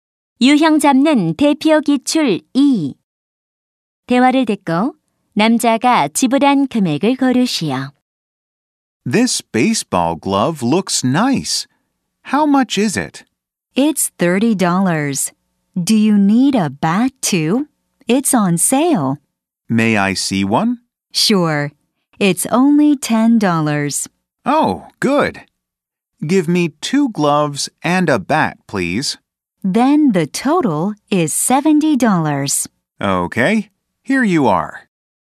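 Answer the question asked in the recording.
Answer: 70달러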